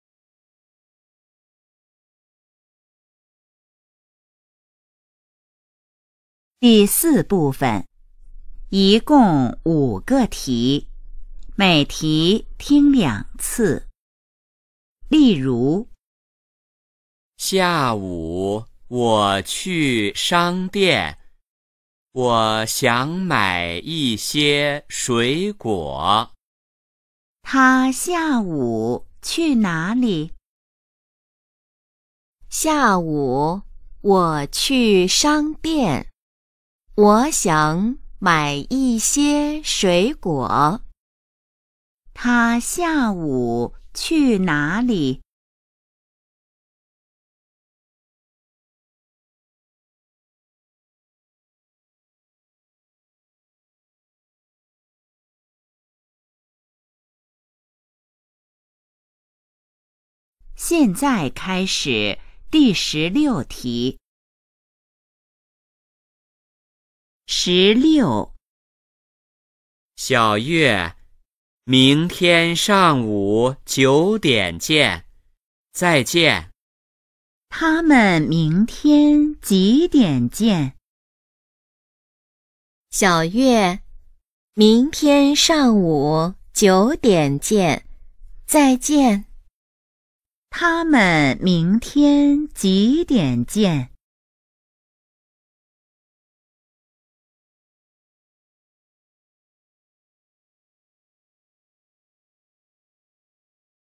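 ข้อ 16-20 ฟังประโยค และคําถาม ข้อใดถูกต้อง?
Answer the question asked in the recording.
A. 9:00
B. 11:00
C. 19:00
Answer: A. 9:00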